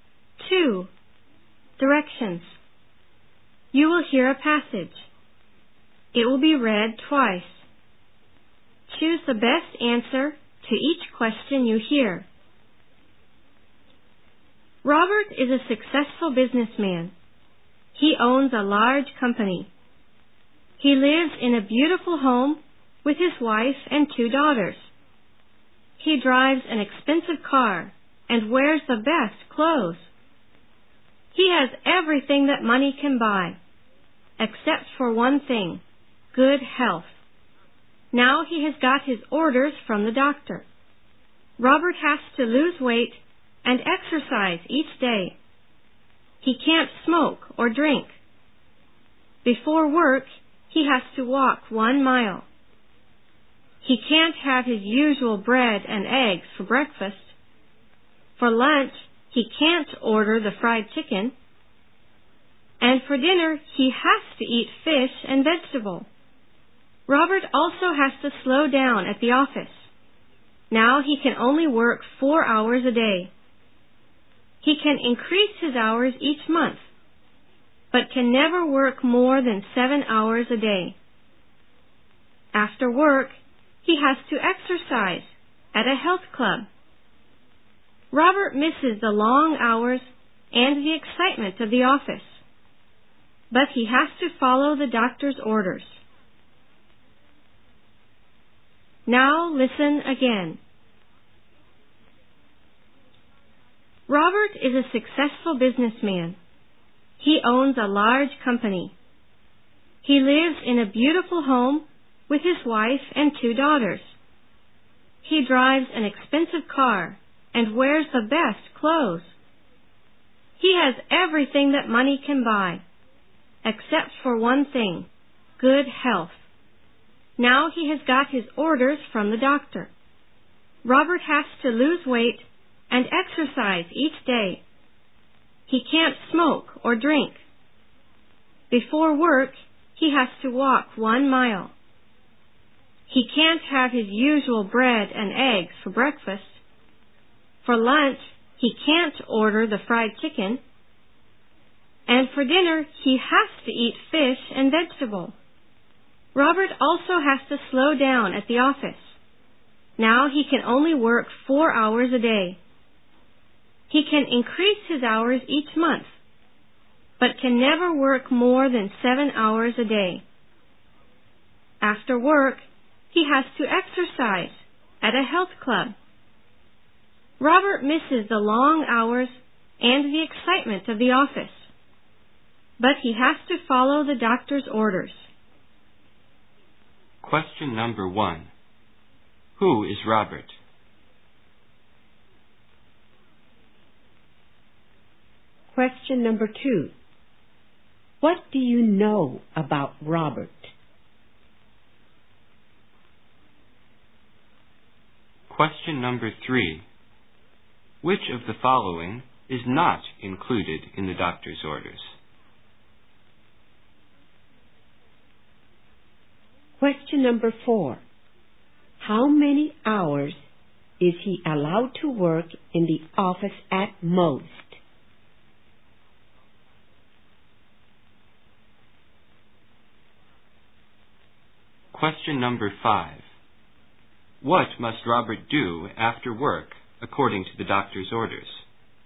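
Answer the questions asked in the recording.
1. A successful businessman
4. 7 hours a day
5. Exercise at a health club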